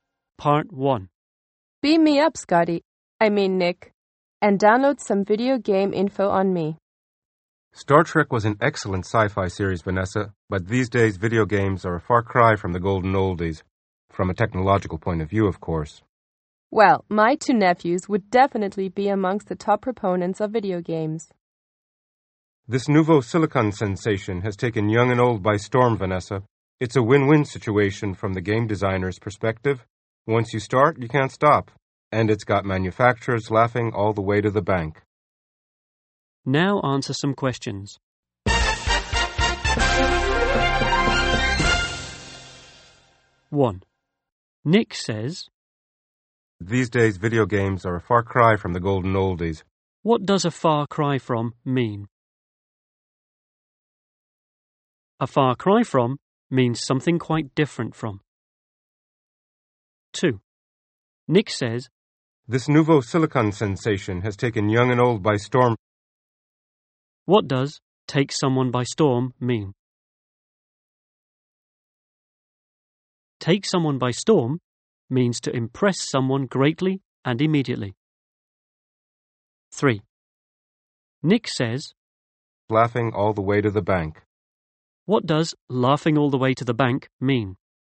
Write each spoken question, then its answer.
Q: What does a far cry from mean?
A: A far cry from means something quite different from.

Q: What does take someone by storm mean?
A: Take someone by storm means to impress someone greatly and immediately.